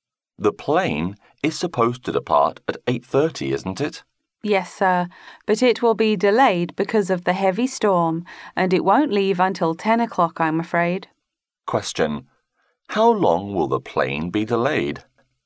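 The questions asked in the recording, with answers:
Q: How long will the plane be delayed?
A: One and a half hours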